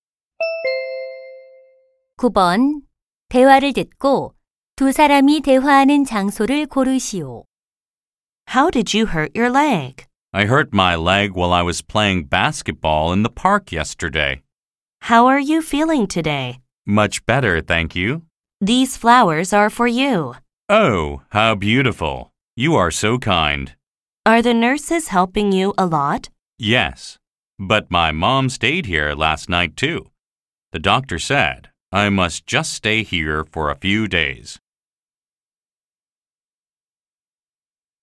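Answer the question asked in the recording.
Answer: 병원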